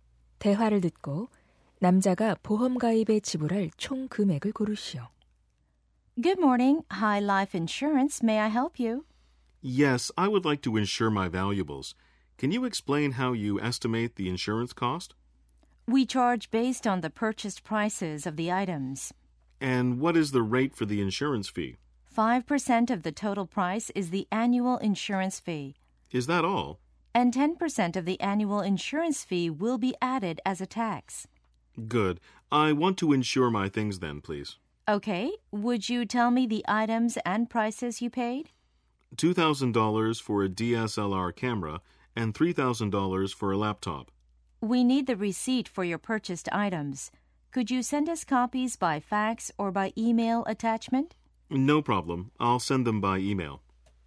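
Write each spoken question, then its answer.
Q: 대화를 듣고 남자가 보험 가입에 지불할 총 금액을 고르시오.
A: 275달러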